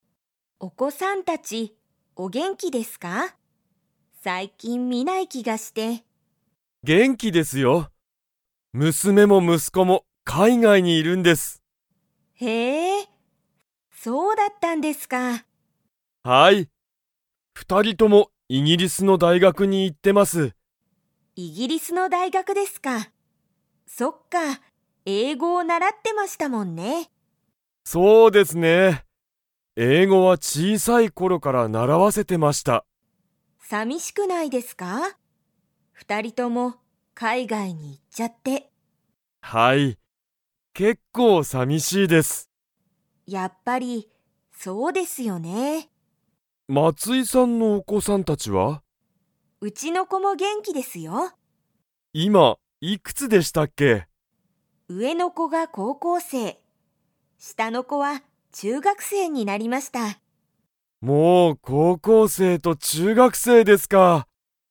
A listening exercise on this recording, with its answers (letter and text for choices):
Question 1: 大西おおにしさんの子供こども達たちは元気げんきですか?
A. はい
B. いいえ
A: A. はい

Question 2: 松井まついさんの下したの子こは になった。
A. 小学生しょうがくせい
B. 中学生ちゅうがくせい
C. 高校生こうこうせい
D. 大学生だいがくせい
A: B. 中学生ちゅうがくせい

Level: Level 4